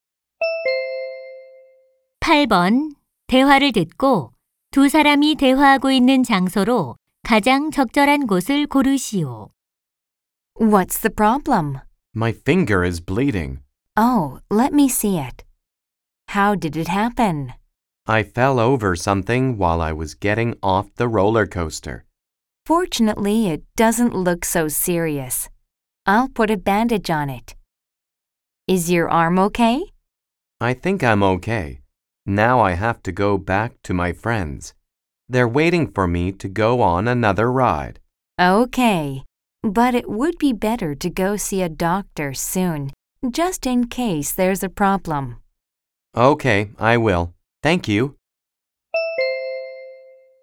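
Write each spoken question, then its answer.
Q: 대화를 듣고 두 사람이 대화하고 있는 장소로 가장 적절한 곳을 고르시오.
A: 놀이공원 응급 처치실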